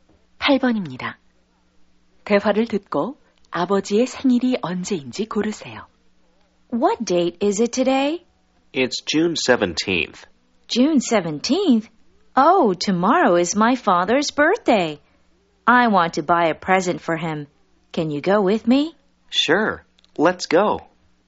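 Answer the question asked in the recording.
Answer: 6월 18일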